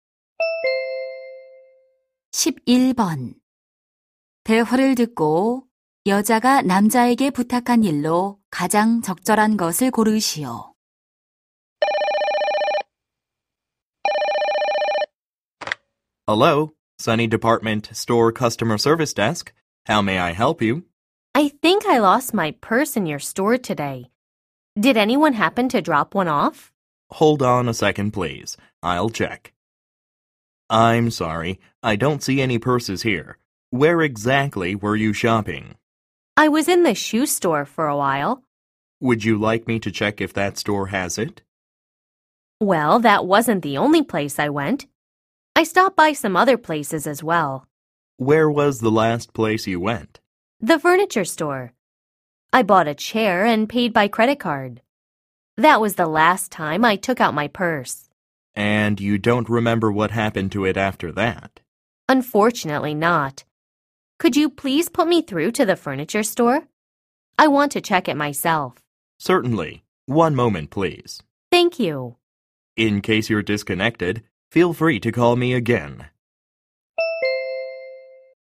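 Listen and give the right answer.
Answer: 가구점으로 전화 연결하기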